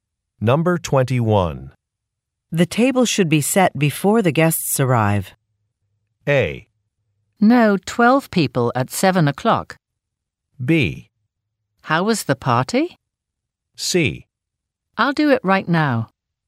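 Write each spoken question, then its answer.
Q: The table should be set before the guests arrive.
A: C: I'll do it right now.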